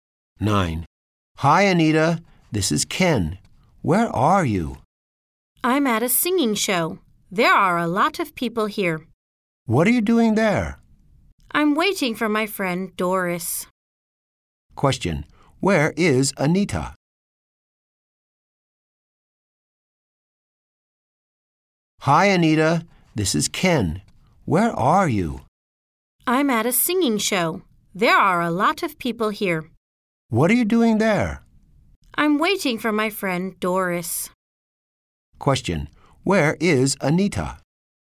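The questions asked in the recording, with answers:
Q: Where is Anita?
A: At a singing show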